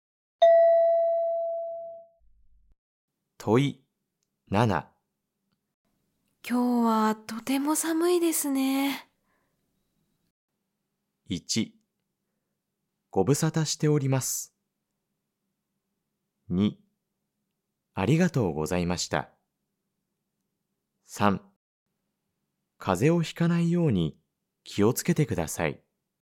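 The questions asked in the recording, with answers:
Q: 今日はとても寒いですね。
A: 3: 風邪をひかないように気をつけてください。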